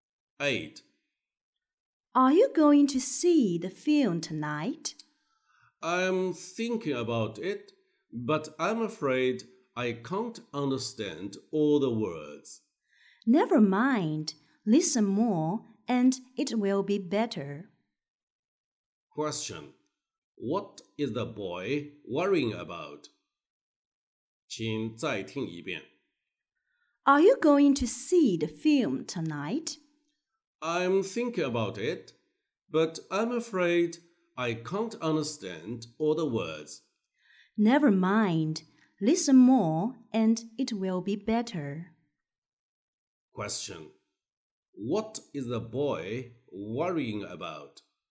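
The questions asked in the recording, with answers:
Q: What is the boy worrying about?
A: He can't understand all the words in the film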